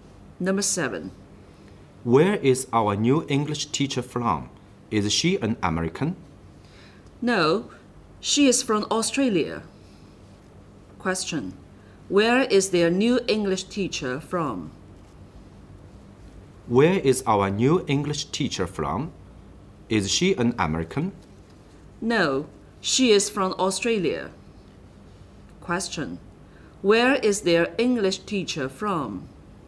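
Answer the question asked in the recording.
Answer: Australia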